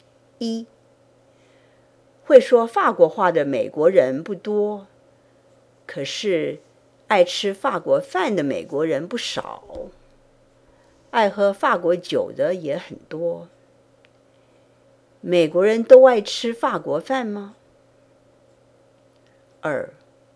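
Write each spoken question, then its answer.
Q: 美国人都爱吃法国饭吗?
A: 不都爱吃,可是爱吃法国饭的美国人不少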